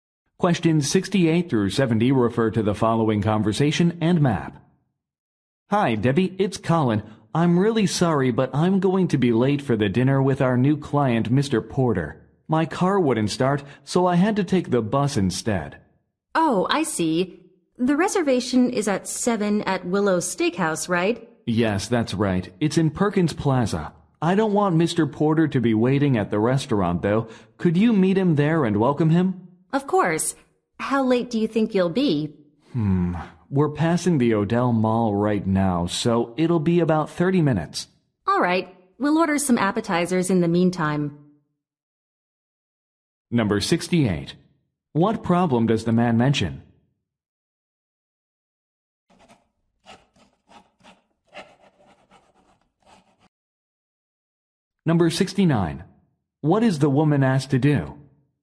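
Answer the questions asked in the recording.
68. His car wouldn't start, so he'll be late
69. Meet and welcome Mr. Porter at the restaurant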